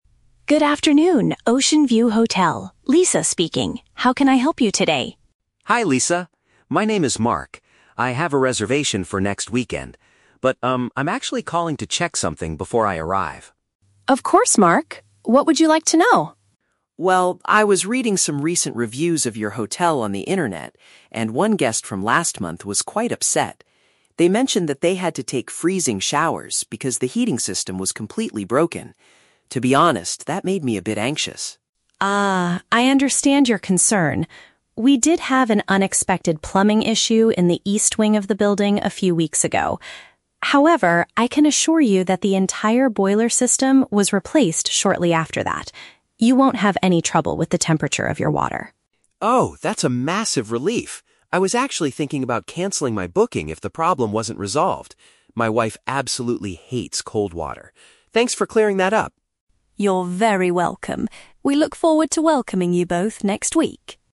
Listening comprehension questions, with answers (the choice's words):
Listen to a phone conversation between a hotel guest and a receptionist. Choose the correct answer (A, B, or C).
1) What is the main purpose of the man's phone call?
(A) To cancel his upcoming reservation.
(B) To confirm a detail he read on the internet.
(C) To change the dates of his holiday.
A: To confirm a detail he read on the internet.

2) What specific problem did the previous guest experience?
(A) The bedroom was freezing cold.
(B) The shower water was not warm enough.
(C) The pipes in the bathroom were very noisy.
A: The shower water was not warm enough.

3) How does the man feel after hearing the receptionist's explanation?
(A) Relieved.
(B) Anxious.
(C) Confused.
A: Relieved.

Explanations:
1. Mark says he is calling to "check something" because he was "reading some recent reviews... on the internet". This paraphrases to confirming a detail he read online. The Trap: Option (A) is a trap. Mark explicitly states: "I was actually thinking about canceling my booking," but he is not doing it now; it was just a thought he had before making the call. Option (C) is a plausible reason to call a hotel but is never mentioned.
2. Mark mentions that the previous guest had to take "freezing showers" because the "heating system was completely broken". "Freezing" means extremely cold, so the water was not warm enough. The Trap: Option (A) is a trap because the word "freezing" is in the audio, but it describes the showers, not the bedroom. Option (C) is a trap because "plumbing" (pipes) is mentioned by the receptionist, but there is no mention of noise.
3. When Mark finds out the problem is fixed, he says, "Oh, that's a massive relief" and thanks the receptionist for "clearing that up". The Trap: Option (B) is a trap. The word "anxious" is used in the audio, but that was how Mark felt before he called, when he first read the bad review. Option (C) is incorrect because Mark understands the situation clearly at the end.

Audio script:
Lisa: Good afternoon, Oceanview Hotel. Lisa speaking. How can I help you today?
Mark: Hi Lisa. My name is Mark. I have a reservation for next weekend. But, um, I'm actually calling to check something before I arrive.
Lisa: Of course, Mark. What would you like to know?
Mark: Well, I was reading some recent reviews of your hotel on the internet, and one guest from last month was quite upset. They mentioned that they had to take freezing showers because the heating system was completely broken. To be honest, that made me a bit anxious.
Lisa: Ah, I understand your concern. We did have an unexpected plumbing issue in the east wing of the building a few weeks ago. However, I can assure you that the entire boiler system was replaced shortly after that. You won't have any trouble with the temperature of your water.
Mark: Oh, that's a massive relief. I was actually thinking about canceling my booking if the problem wasn't resolved. My wife absolutely hates cold water. Thanks for clearing that up!